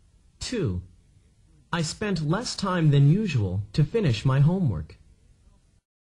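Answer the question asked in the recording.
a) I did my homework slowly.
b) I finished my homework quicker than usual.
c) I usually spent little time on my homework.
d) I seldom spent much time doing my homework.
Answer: b) I finished my homework quicker than usual.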